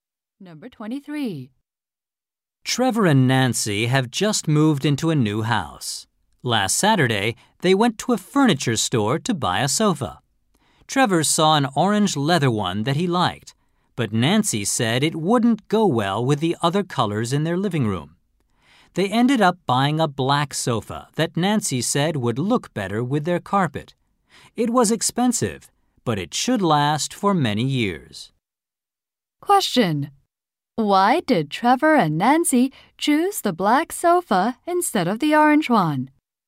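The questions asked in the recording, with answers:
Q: Why did Trevor and Nancy choose the black sofa instead of the orange one?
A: It would look better with the colors of their living room.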